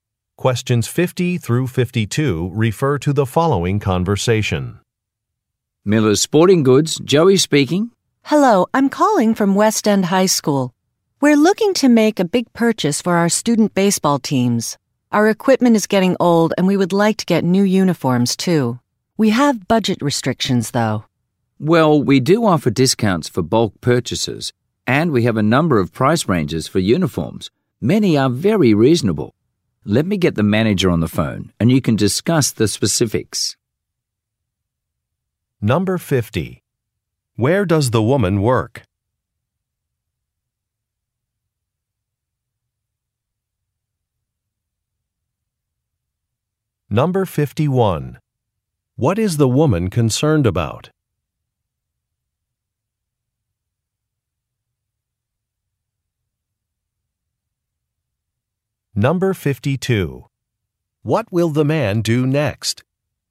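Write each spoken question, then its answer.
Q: Where does the woman work?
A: At a high school

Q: What is the woman concerned about?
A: Budget restrictions

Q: What will the man do next?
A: Get the manager on the phone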